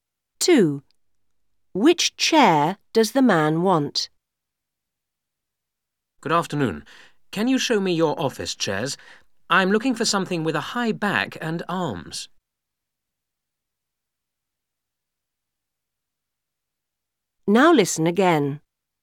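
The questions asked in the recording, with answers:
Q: Which chair does the man want?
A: An office chair with a high back and arms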